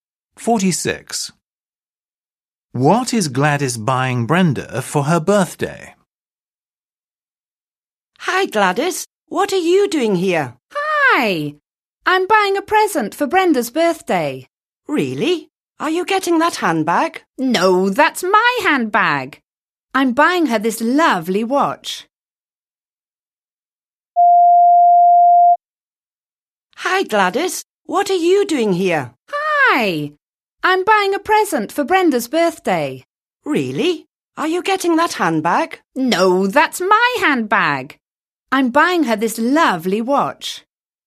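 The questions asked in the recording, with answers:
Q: What is Gladys buying Brenda for her birthday?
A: a watch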